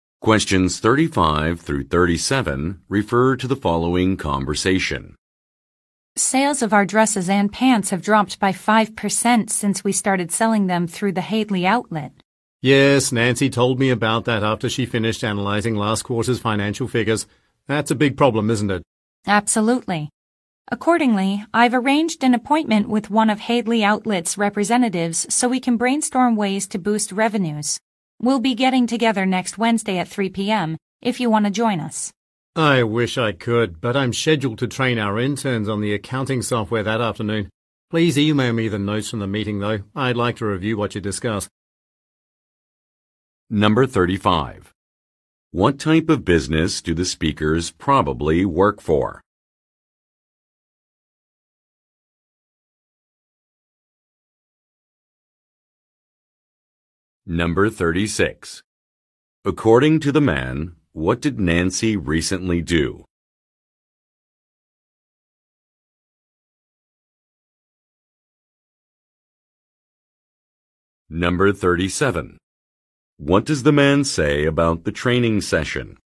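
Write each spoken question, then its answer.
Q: What type of business do the speakers probably work for?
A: A clothing company

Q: According to the man, what did Nancy recently do?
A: She analyzed last quarter's financial figures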